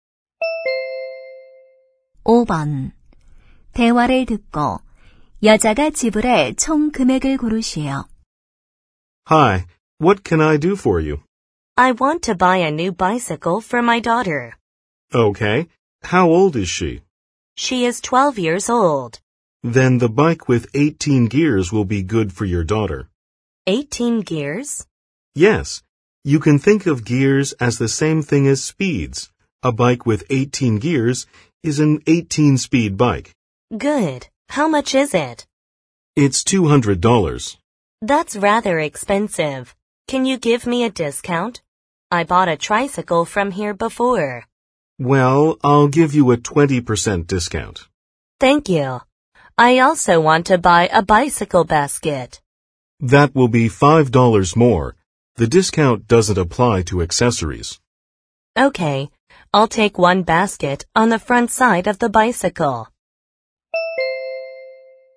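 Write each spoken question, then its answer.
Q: 대화를 듣고 여자가 지불할 총 금액을 고르시오.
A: 165달러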